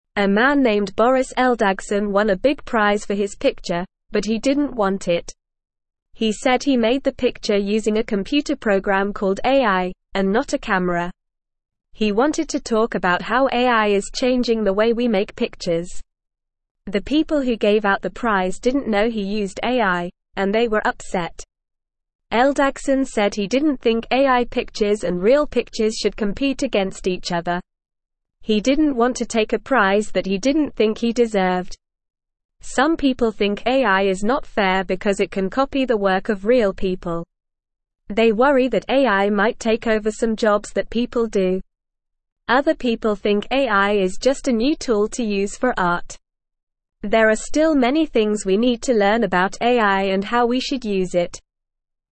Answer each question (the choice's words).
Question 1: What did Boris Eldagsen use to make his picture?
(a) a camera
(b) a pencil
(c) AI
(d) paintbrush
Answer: AI

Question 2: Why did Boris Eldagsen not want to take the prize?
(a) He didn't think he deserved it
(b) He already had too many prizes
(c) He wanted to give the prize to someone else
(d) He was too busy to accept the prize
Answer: He didn't think he deserved it

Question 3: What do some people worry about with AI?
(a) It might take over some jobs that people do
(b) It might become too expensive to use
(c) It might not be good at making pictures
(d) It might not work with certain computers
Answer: It might take over some jobs that people do

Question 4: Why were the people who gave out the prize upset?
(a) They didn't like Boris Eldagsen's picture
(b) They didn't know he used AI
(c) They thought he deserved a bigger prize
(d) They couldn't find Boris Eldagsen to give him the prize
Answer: They didn't know he used AI

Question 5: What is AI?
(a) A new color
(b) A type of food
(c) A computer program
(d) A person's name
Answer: A computer program

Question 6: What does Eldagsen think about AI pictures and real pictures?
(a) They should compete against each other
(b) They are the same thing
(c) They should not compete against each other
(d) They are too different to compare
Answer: They should not compete against each other

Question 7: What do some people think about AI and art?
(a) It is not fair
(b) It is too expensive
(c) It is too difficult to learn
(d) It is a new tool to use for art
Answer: It is a new tool to use for art

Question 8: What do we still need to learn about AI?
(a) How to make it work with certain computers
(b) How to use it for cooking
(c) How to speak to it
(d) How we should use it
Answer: How we should use it

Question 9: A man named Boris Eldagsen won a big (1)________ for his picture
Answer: prize

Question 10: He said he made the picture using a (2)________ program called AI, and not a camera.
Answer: computer

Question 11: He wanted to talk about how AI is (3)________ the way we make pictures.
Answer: changing

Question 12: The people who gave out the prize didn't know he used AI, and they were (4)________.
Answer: upset

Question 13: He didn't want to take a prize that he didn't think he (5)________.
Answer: deserved

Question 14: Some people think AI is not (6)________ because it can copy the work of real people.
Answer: fair

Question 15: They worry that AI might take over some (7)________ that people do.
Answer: jobs

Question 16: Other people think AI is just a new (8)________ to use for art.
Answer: tool

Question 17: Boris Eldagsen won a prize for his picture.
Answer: True

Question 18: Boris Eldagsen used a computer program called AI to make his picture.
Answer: True

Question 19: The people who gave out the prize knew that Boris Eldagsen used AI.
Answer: False

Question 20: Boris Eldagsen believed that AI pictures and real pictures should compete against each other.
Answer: False

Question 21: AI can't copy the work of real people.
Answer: False

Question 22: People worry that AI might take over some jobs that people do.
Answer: True

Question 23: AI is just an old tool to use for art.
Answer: False

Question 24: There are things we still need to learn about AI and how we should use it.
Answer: True

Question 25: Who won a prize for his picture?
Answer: A man named Boris Eldagsen won a prize for his picture.

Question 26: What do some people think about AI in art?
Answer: Some people think AI is just a new tool to use for art.

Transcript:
A man named Boris Eldagsen won a big prize for his picture, but he didn't want it. He said he made the picture using a computer program called AI, and not a camera. He wanted to talk about how AI is changing the way we make pictures. The people who gave out the prize didn't know he used AI, and they were upset. Eldagsen said he didn't think AI pictures and real pictures should compete against each other. He didn't want to take a prize that he didn't think he deserved.
Some people think AI is not fair because it can copy the work of real people. They worry that AI might take over some jobs that people do. Other people think AI is just a new tool to use for art. There are still many things we need to learn about AI and how we should use it.

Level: Level 1